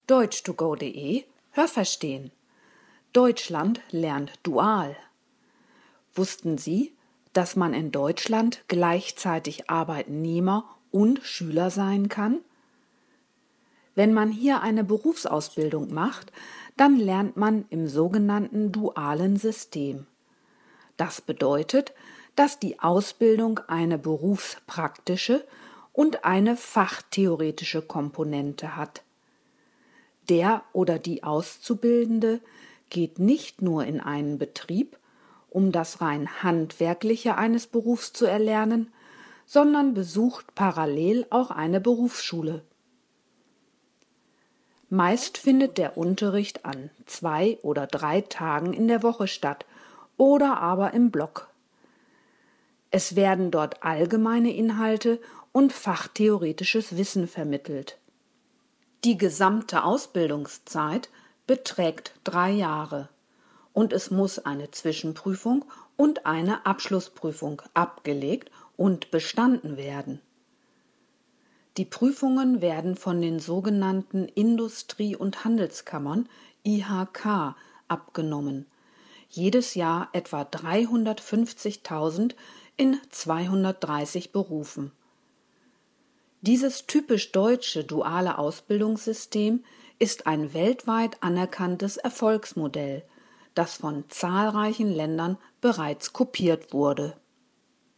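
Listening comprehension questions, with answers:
Haben Sie das gehört? Stimmt diese Aussage?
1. Alle Arbeitnehmer in Deutschland sind auch Schüler.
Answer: Falsch

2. Im dualen System hat die Ausbildung eine berufspraktische und eine fachtheoretische Komponente.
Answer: Richtig

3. Der Berufsschulunterricht findet an einzelnen Tagen oder im Block statt.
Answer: Richtig

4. Die gesamte Ausbildungszeit beträgt zwei Jahre.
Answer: Falsch

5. Es müssen eine Zwischenprüfung und eine Abschlussprüfung erfolgreich abgelegt werden.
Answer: Richtig

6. Die Prüfungen werden von den Betrieben abgenommen, in denen die Ausbildung stattfindet.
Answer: Falsch

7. Das deutsche duale Ausbildungssystem ist weltweit renommiert und wird mittlerweile in vielen Ländern angewendet.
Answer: Richtig

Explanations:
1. Das bezieht sich auf die Berufsausbildung. Während dieser Zeit gehen Auszubildende sowohl arbeiten als auch zur Schule.
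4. Sie dauert drei Jahre.
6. Sie werden von den Industrie- und Handelskammern (IHK) abgenommen.

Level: B (mittel)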